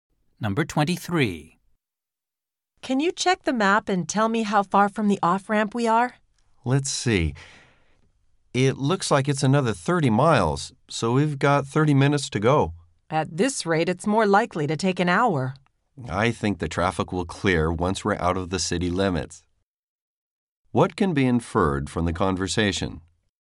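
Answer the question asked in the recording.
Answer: Traffic is heavy, so the trip may take longer than 30 minutes.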